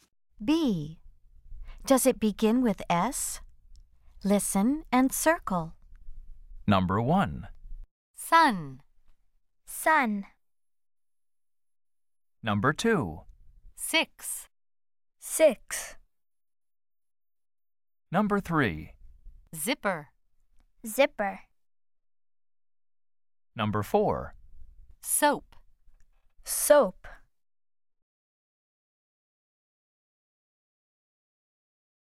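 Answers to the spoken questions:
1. Yes (sun)
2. Yes (six)
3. No (zipper)
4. Yes (soap)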